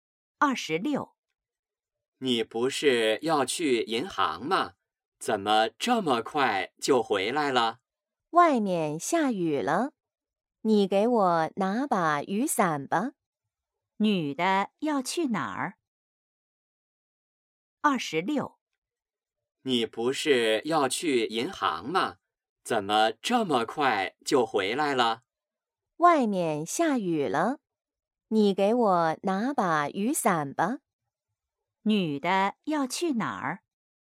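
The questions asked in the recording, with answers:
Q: 女的要去哪儿?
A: 银行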